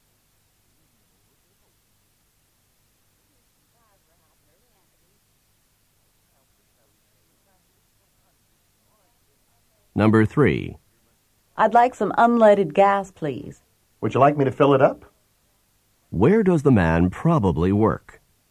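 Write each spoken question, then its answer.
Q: Where does the man probably work?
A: At a gas station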